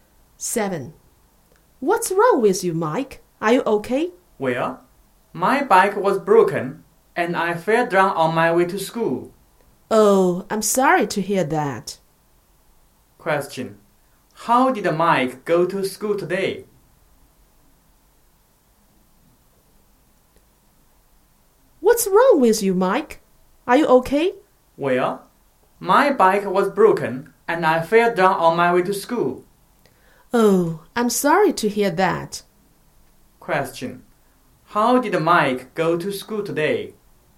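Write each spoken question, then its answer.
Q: How did Mike go to school today?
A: By bike.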